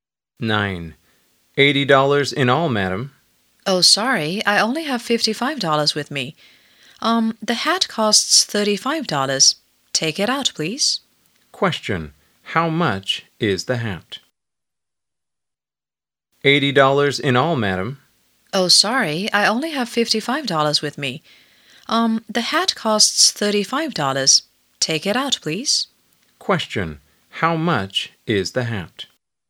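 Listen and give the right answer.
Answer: $35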